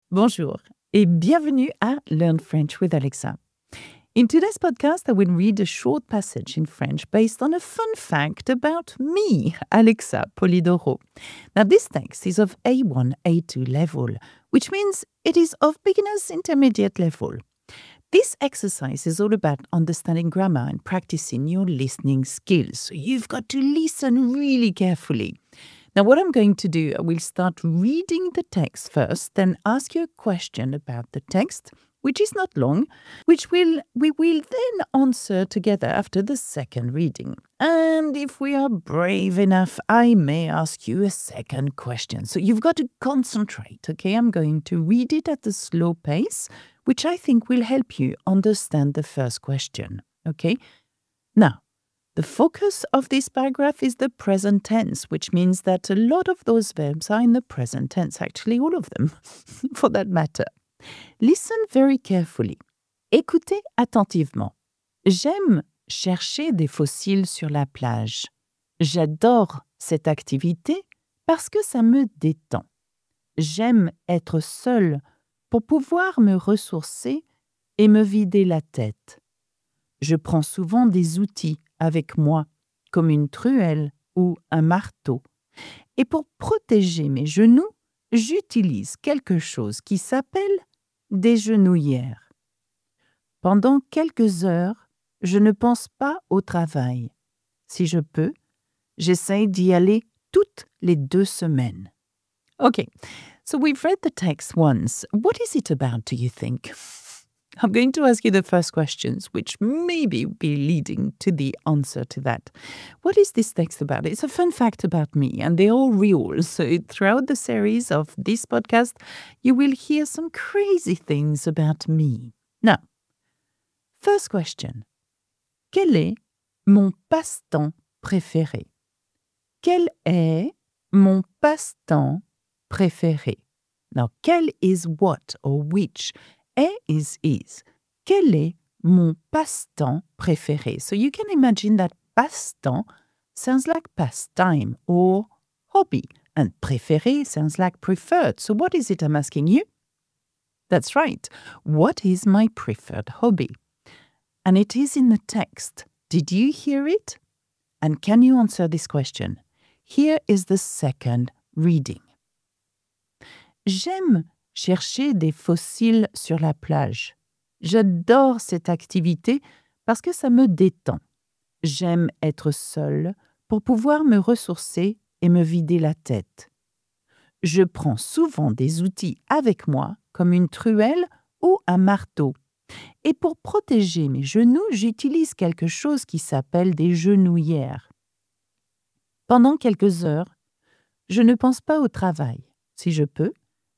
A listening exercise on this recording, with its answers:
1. Quel est mon passe-temps préféré ?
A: Chercher des fossiles

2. Quels sont les outils que j'utilise ?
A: Une truelle et un marteau

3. Quand est-ce que je fais cette activité ?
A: Toutes les deux semaines